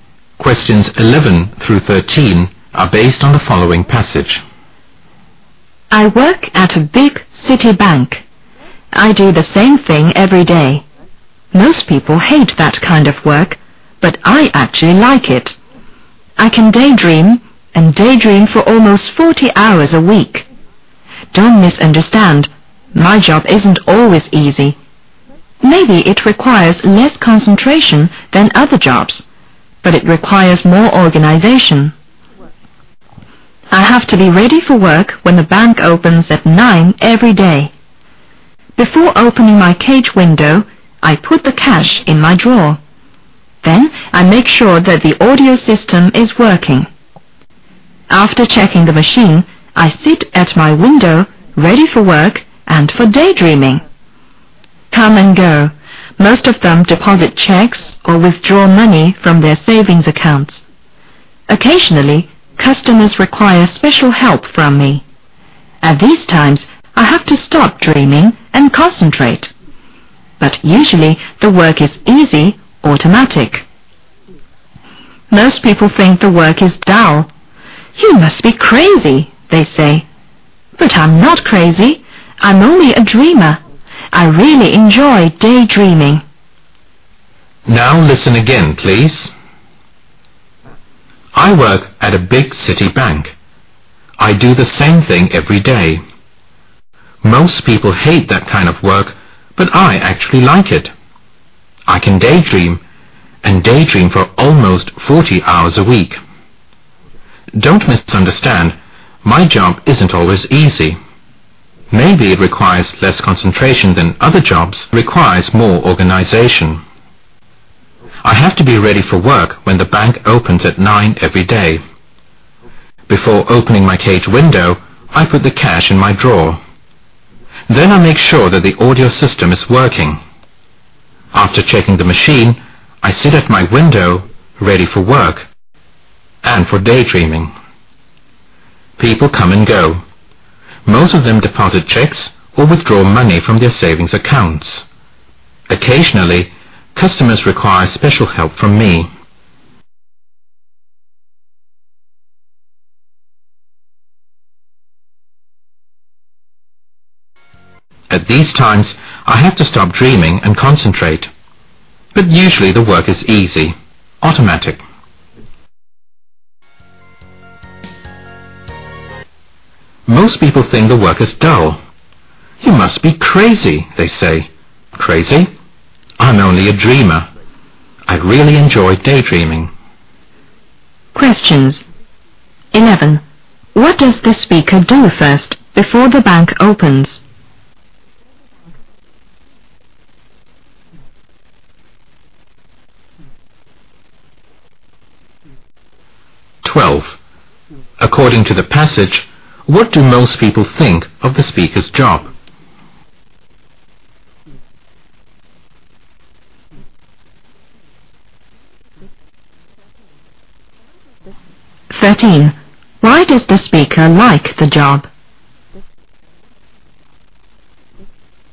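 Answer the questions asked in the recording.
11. Puts the cash in the drawer
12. It is dull
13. He can daydream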